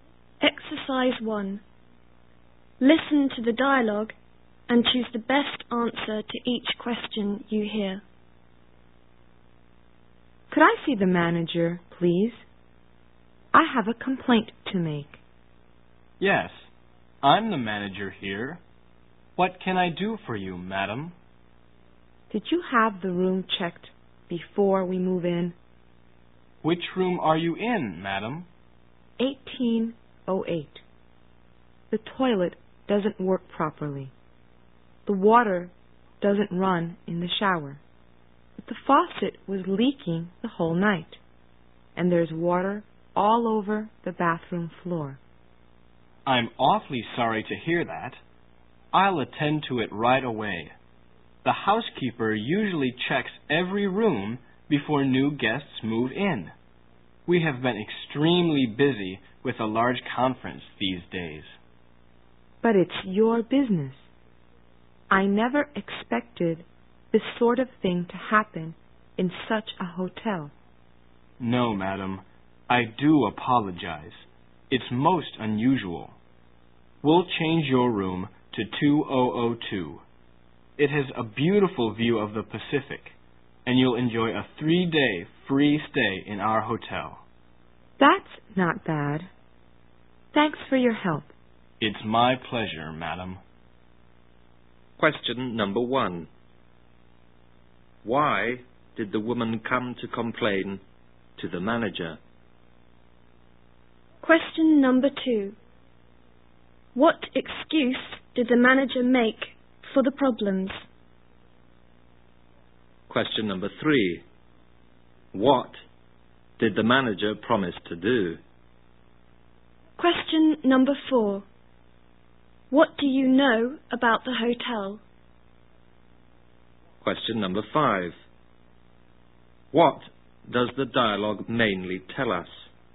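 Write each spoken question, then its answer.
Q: Why did the woman come to complain to the manager?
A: Her room's bathroom had problems: the toilet didn't work, there was no water in the shower, and the faucet leaked

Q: What excuse did the manager make for the problems?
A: They had been very busy with a large conference

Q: What did the manager promise to do?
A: Change her room to 2002 and give her a 3-day free stay

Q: What does the dialogue mainly tell us?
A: A hotel guest complains to the manager about her room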